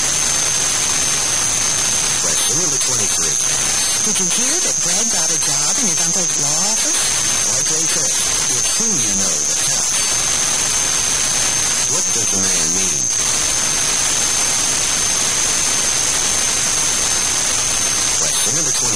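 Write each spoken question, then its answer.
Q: What does the man mean?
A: Brad got the job through his connections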